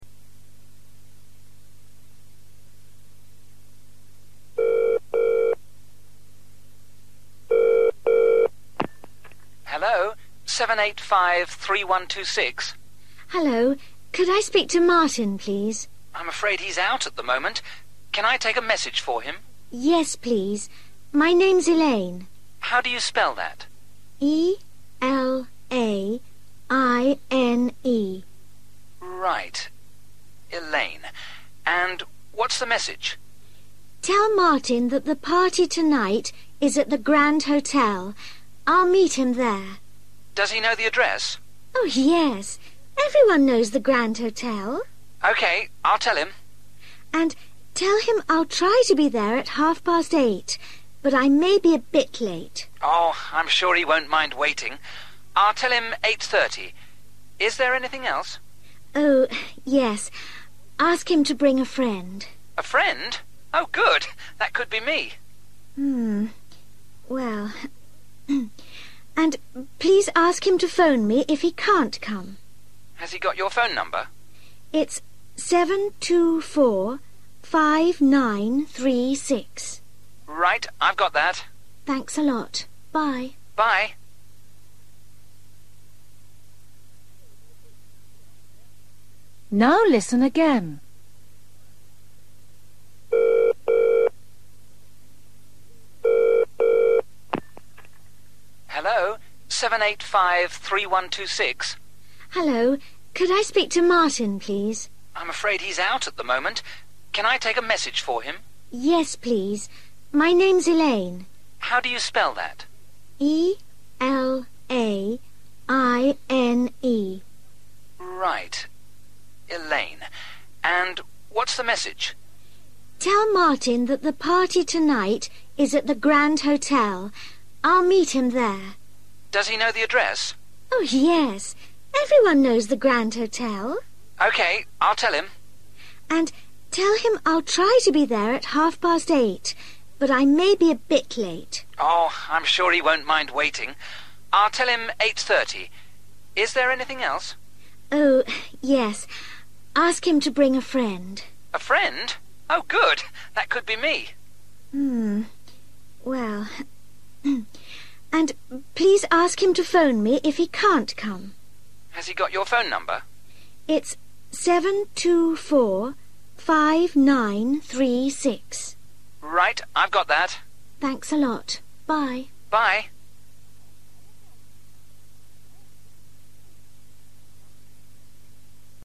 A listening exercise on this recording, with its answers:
Listen and complete questions 16-20.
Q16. From:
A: Elaine

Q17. Party at:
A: (the) Grand Hotel

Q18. Time:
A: 8.30 p.m./ 20.30/ half past eight

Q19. Please bring:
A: friend

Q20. Her phone number:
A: 724 5936

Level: A2